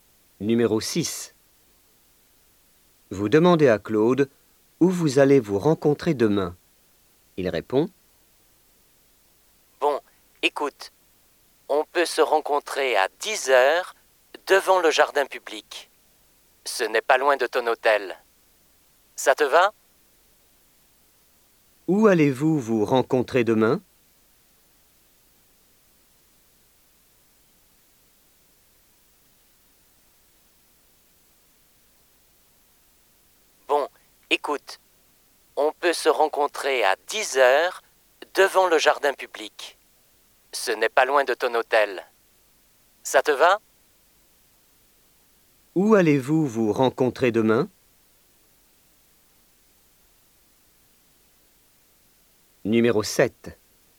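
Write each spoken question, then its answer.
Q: Où allez-vous vous rencontrer demain ?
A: Devant le jardin public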